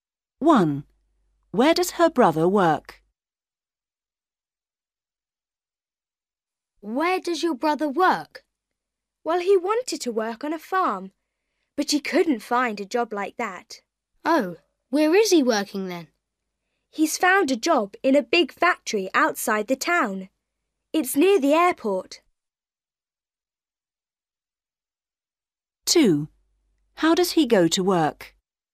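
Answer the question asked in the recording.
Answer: in a big factory near the airport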